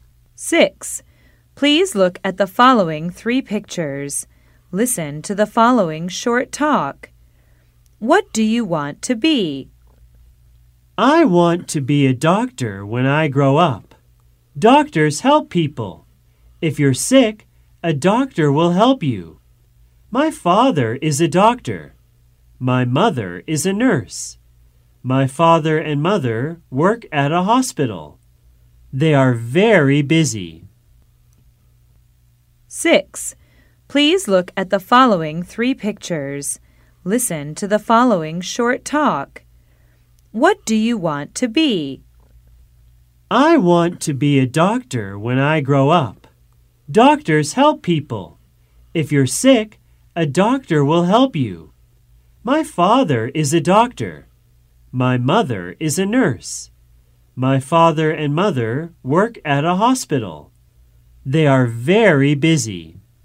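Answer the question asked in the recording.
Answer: A doctor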